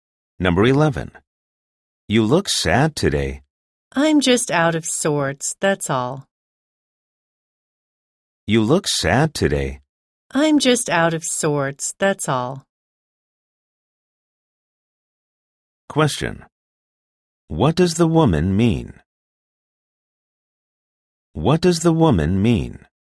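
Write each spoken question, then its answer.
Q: What does the woman mean?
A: She is just feeling a little unwell or in a bad mood.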